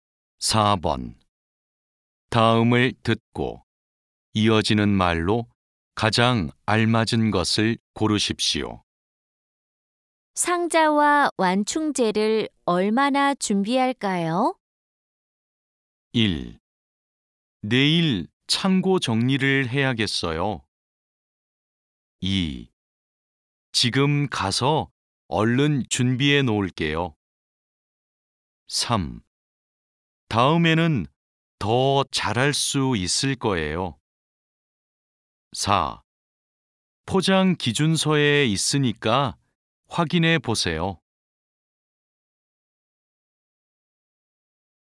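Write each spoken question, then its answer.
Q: 상자와 완충재를 얼마나 준비할까요?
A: 4: 포장 기준서에 있으니까 확인해 보세요.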